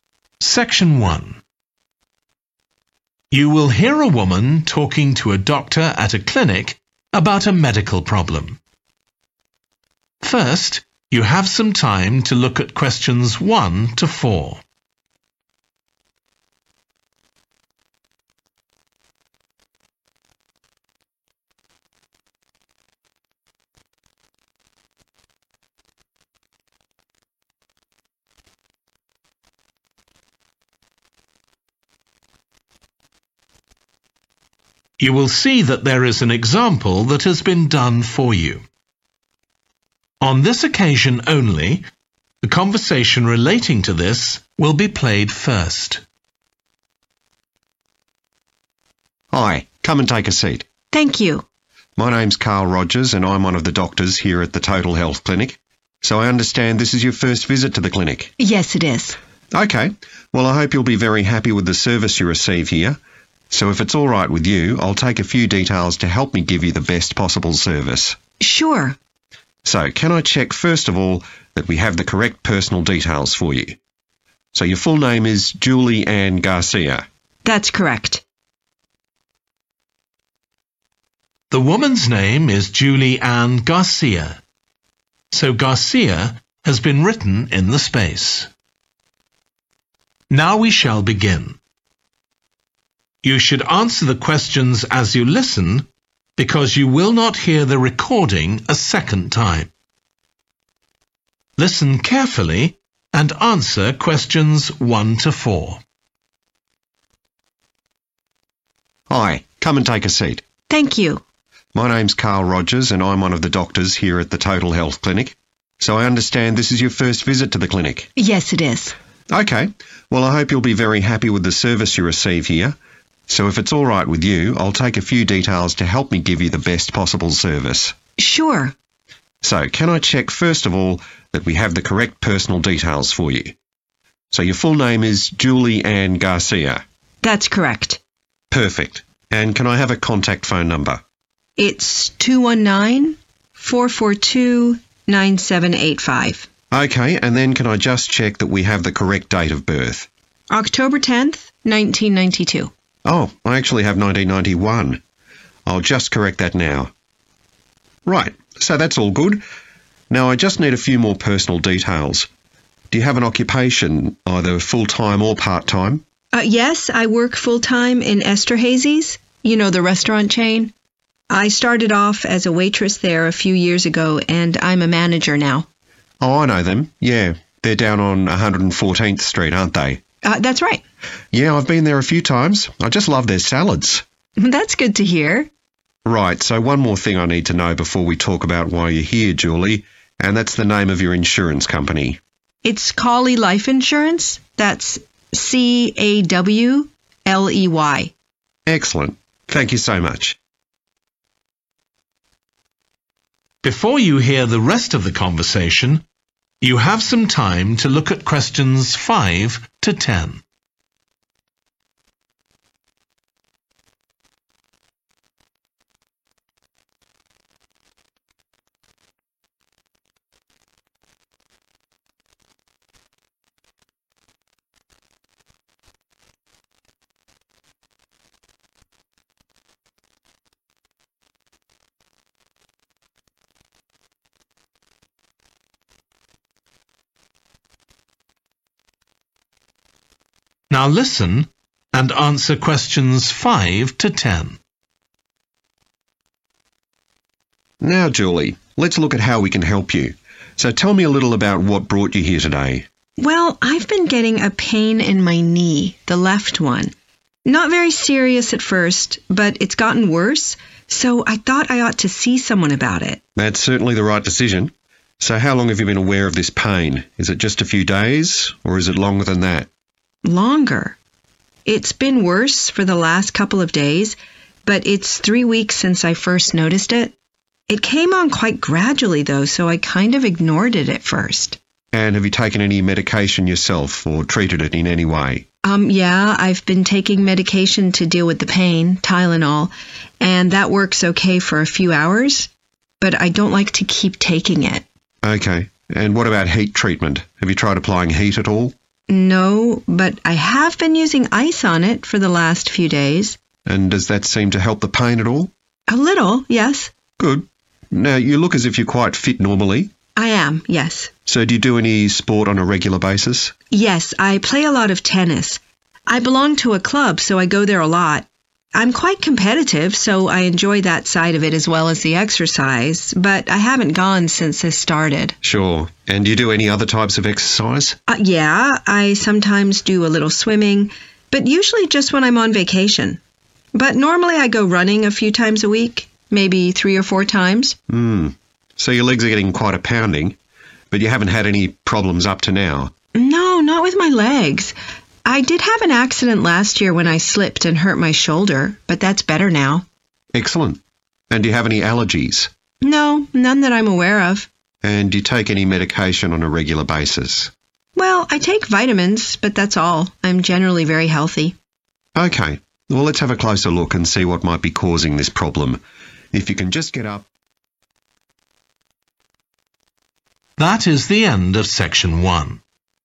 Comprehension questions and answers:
Complete the notes below. Write ONE WORD AND/OR A NUMBER for each answer.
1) Contact phone: 1.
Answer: 219 442 9785

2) Date of birth: 2. , 1992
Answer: 10(th) October

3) works as a 3.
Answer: manager

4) Insurance company: 4. Life Insuranc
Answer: Cawley

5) pain in her left 5.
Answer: knee

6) When it began: 6. ago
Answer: 3 weeks

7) belongs to a 7. club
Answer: tennis

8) goes 8. Regularly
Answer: running

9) injured her 9. last year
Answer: shoulder

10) no regular medication apart from 10.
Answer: vitamins